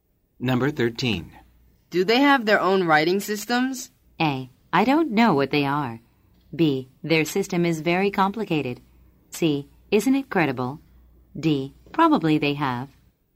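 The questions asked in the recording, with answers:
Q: Do they have their own writing systems?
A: D: Probably they have.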